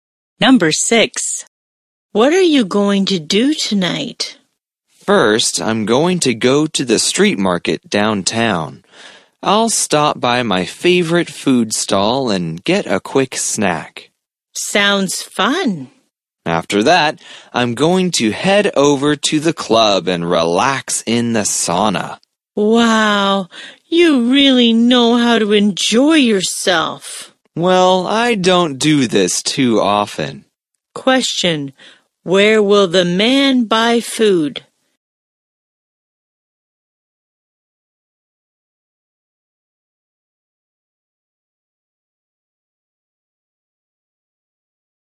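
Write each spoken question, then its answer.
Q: Question, where will the man buy food?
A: At his favorite food stall at the street market downtown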